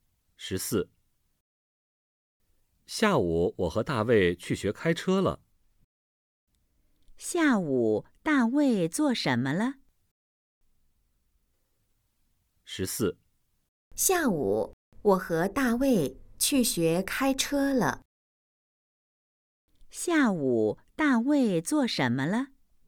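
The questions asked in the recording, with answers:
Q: 下午大卫做什么了?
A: 去学开车了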